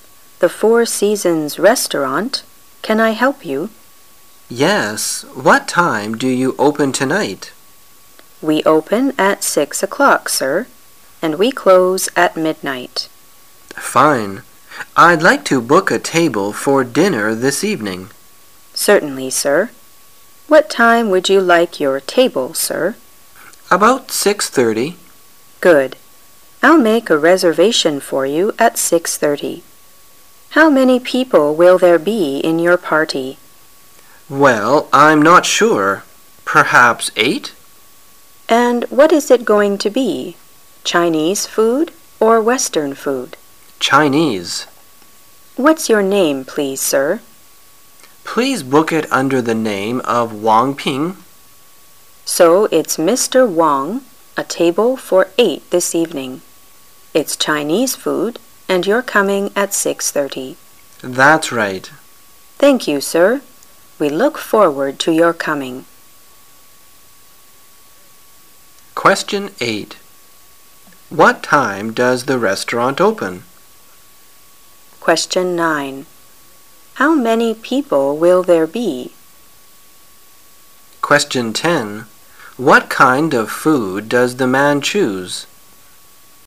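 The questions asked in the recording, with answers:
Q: What time does the restaurant open?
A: At 6 o'clock

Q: What kind of food does the man choose?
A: Chinese food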